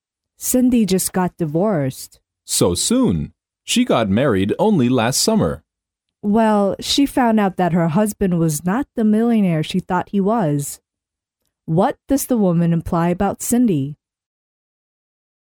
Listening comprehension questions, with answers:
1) What does the woman imply about Cindy?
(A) She married because of loneliness.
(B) She married a millionaire.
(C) She married for money.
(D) She married for love.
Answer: She married for money.

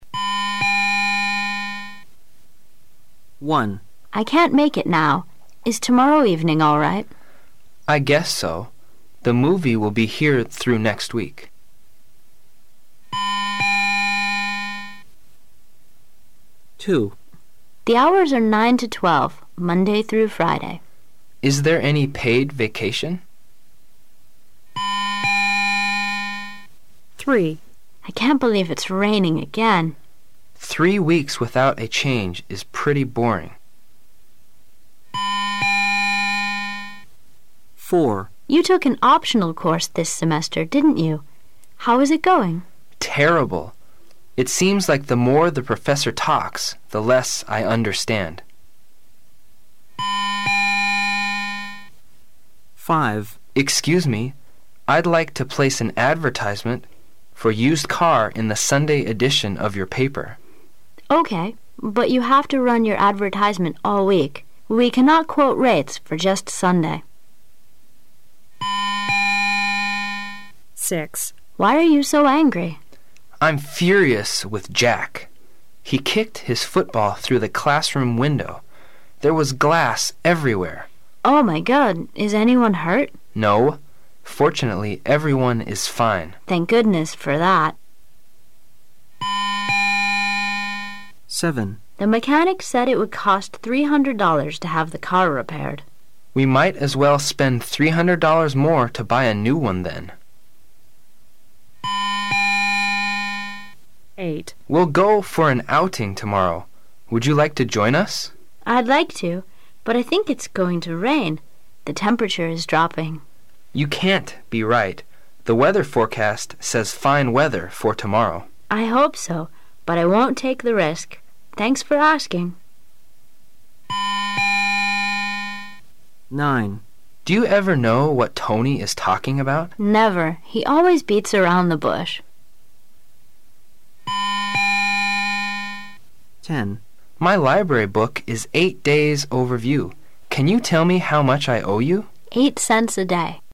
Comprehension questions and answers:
You will hear 10 short dialogues. For each dialogue, there is one question and four possible answers. Choose the correct answer — A, B, C or D, and mark it in your test booklet. You will have 15 seconds to answer the question and you will hear each dialogue ONLY ONCE.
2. What are these two talking about?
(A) An appointment.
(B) School hours.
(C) A part-time job.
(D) Vacation plans.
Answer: A part-time job.

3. What does the man mean?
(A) There' s been nothing but rain for quite some time.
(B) He's bored with the changing weather.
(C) He thinks that it'll rain for three weeks.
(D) He' s bored about the topic on weather.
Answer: There' s been nothing but rain for quite some time.

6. How does the woman feel at the end of the conversation?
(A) Angry.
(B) Relieved.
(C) Upset.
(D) Sarcastic.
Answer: Relieved.

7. What would the man probably do?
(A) To save $ 300.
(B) To have the mechanic repair the car.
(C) To repair the car himself.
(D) To buy a new car.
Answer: To buy a new car.

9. What is the reason they can' t understand Tony?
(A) He speaks too fast.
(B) He speaks too slow.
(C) He doesn't come to the point.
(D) His speech is not clear.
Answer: He doesn't come to the point.

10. How much does the man owe the woman?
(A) 64 cents.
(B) 18 cents.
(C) 80 cents.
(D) 16 cents.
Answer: 64 cents.

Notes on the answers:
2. W: The hours are 9 to 12 Monday through Friday. M: ls there any paid vacation?
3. W: I can' t believe it' s raining again. M: Three weeks without a change is pretty boring.
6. W: Why are you so angry? M: I' m furious with Jack! He kicked his football through the classroom window. There was glass everywhere. W: Oh,my God! Is anyone hurt? M: No, fortunately everyone is fine. W: Thank goodness for that!
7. W: The mechanic said it would cost 300 dollars to have the car repaired. M: We might as well spend 300 dollars more to buy a new one then.
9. M: Do you ever know what Tony is talking about? W: Never! He always beats around the bush.
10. M: My library book is eight days overdue. Can you tell me how much I owe you? W: 8 cents a day.

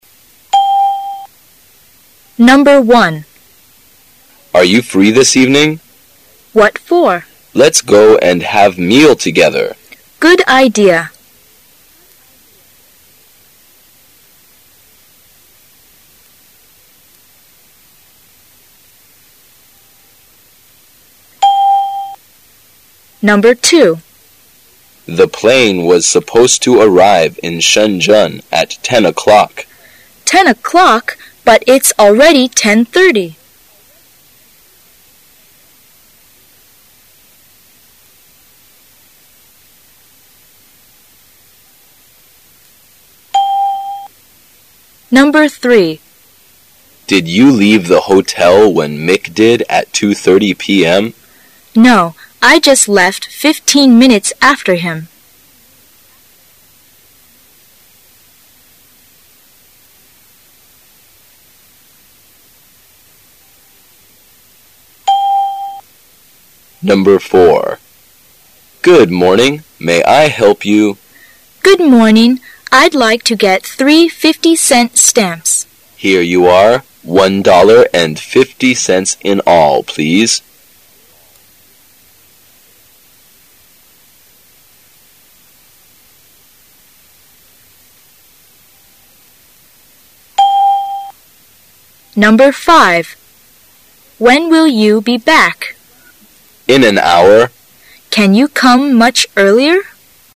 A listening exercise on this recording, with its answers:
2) What does the woman mean?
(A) They're going to be very late.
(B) The plane doesn't fly near Shenzhen.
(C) The plane is going to land.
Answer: They're going to be very late.

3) When did the woman leave the hotel?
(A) At 2:50 p.m.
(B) At2:35 p.m.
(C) At2:45 p.m.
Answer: At2:45 p.m.

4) Where are they?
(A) In a bank.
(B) At a post.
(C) In a department store.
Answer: At a post.

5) What does the man mean?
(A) It'll be too early.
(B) It'll be a bit late.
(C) He doesn't Want the woman to leave.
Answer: It'll be a bit late.

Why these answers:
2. [解析] 根据对话"飞机应该在10点钟到达深圳""但已经10:30了",所以他们迟到了。故本题答案为A。 [听力原文] M: The plane was supposed to arrive in Shenzhen at ten o'clock. W: Ten o'clock! But it's already ten-thirty!
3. [解析] 根据对话"女士比男士的2:30晚15分钟"。故本题答案为C。 [听力原文] M: Did you leave the hotel when Mick did at 2:30 p. m. W: No, I just left fifteen minutes after him.
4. [解析] 根据对话得知女士在购买邮票,因此是在邮局。故本题答案为B。 [听力原文] M: Good morning . May I help you? W: Good morning. I' d like to get three 50-cent stamps. M: Here you are. One dollar and 50 cents in all, please
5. [解析] 根据对话"你不能早些回来吗",推定他觉得有点晚。故本题答案为B。 [听力原文] W: When will you be back? M: In an hour. W: Can you come much earlier?

